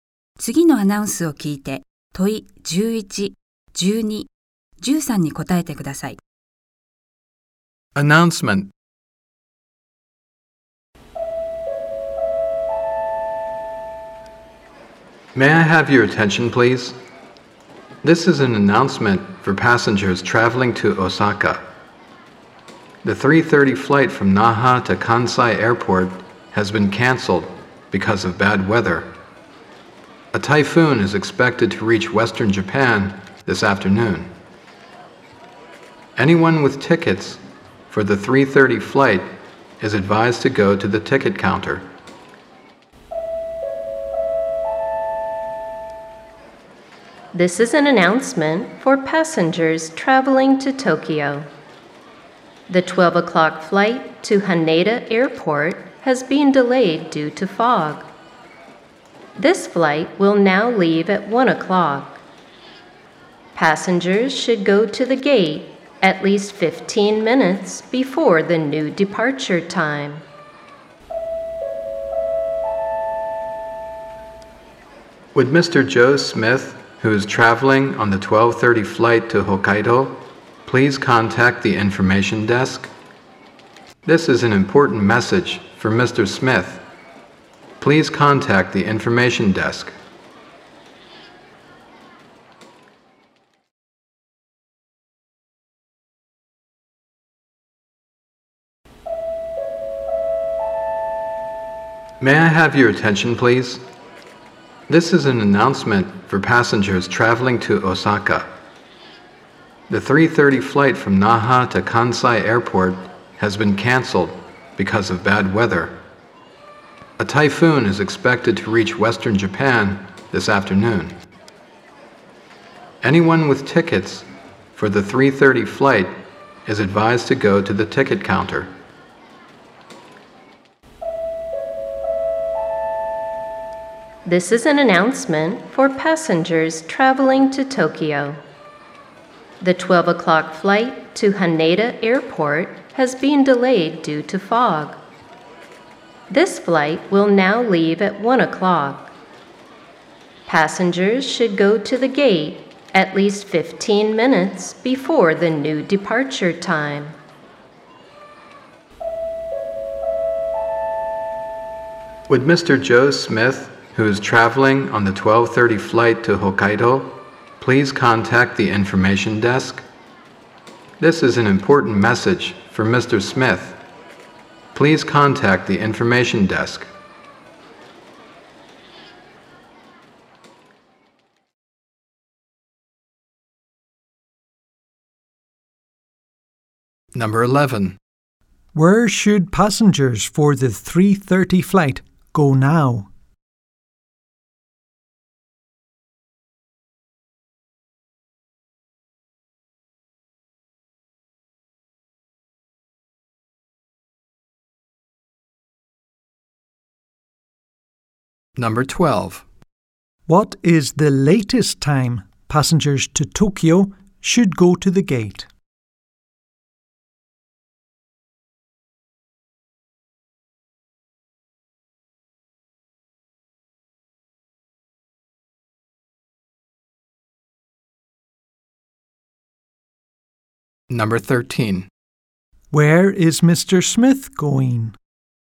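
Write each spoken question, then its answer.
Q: Where should passengers for the 3:30 flight go now?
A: To the ticket counter

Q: What is the latest time passengers to Tokyo should go to the gate?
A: 12:45

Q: Where is Mr. Smith going?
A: Hokkaido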